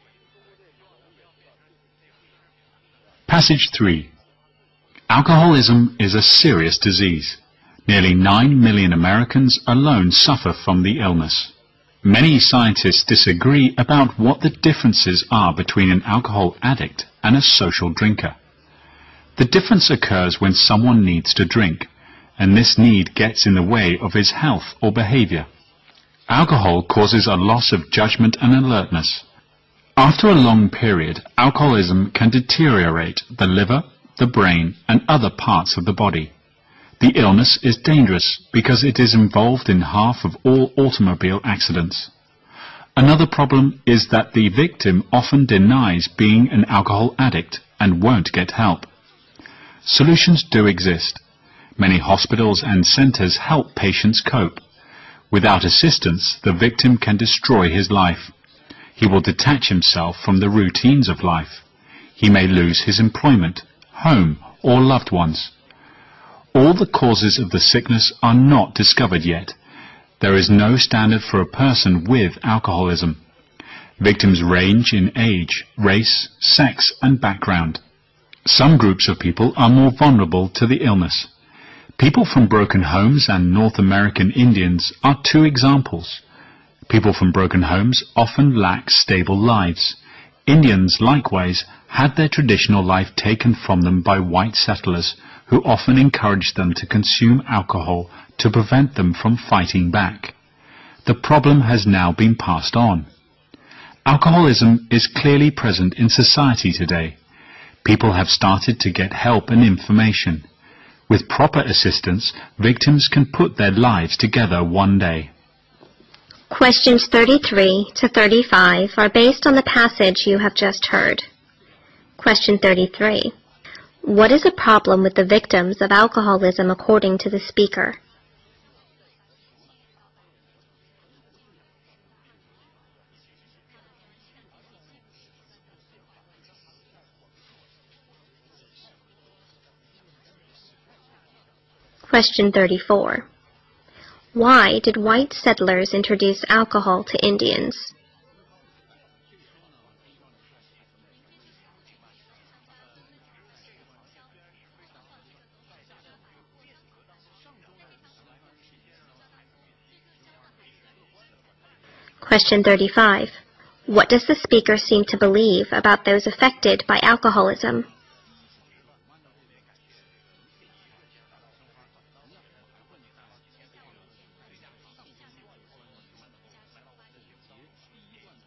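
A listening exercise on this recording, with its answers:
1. What is the problem of the victims about alcoholism according to the speaker?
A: They often deny being addicts and won't get help.

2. Why did white settlers introduce alcohol to Indians?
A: To stop them from fighting back.

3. What does the speaker seem to believe about those affected by alcoholism?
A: With proper help, they can rebuild their lives.

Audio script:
Passage 3
Alcoholism is a serious disease. Nearly nine million Americans alone suffer from the illness. Many scientists disagree about what the differences are between the alcohol addict and social drinker. The difference occurs when someone needs to drink. And this need gets in the way of his health or behavior. Alcohol causes a loss of judgment and alertness. After a long period, alcoholism can deteriorate the liver, the brain and other parts of the body. The illness is dangerous, because it is involved in half of all automobile accidents. 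Another problem is that the victim often denies being an alcohol addict and won't get help. Solutions do exist. Many hospitals and centers help patients cope. Without the assistance, the victim can destroy his life. He would detach himself from the routines of life. He may lose his employment, home or loved ones.
All the causes of the sickness are not discovered yet. There is no standard for a person with alcoholism. Victims range in age, race, sex and background. Some groups of people are more vulnerable to the illness. People from broken homes and North American Indians are two examples. People from broken homes often lack stable lives. Indians likewise had the traditional life taken from them by white settlers who often encourage them to consume alcohol to prevent them from fighting back. The problem has now been passed on. Alcoholism is clearly present in society today. People have started to get help and information. 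With proper assistance, victims can put their lives together one day.
Question 33 to 35 are based on the passage you have just heard.

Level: 六级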